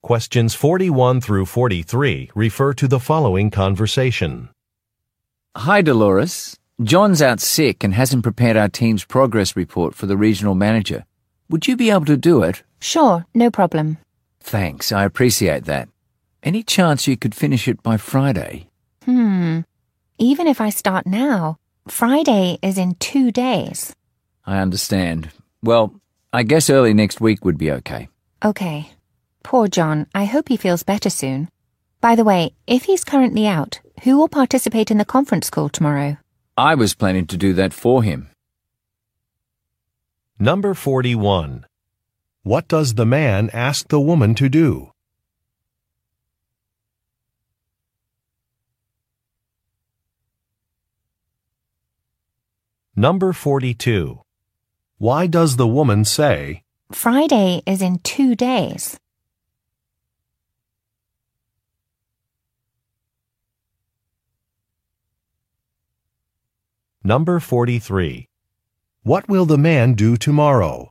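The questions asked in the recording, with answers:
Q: What does the man ask the woman to do?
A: Prepare the team's progress report

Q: Why does the woman say, Friday is in 2 days?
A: To say she can't finish the report by Friday

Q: What will the man do tomorrow?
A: Take part in the conference call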